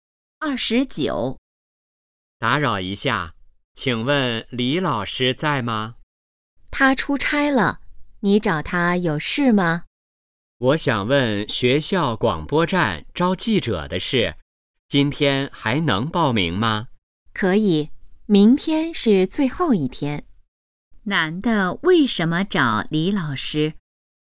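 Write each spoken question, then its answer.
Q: 男的为什么找李老师?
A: 问广播站招记者的事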